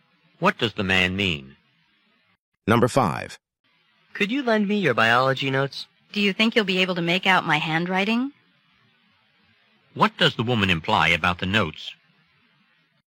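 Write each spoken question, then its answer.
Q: What does the woman imply about the notes?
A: Her handwriting may be hard to read.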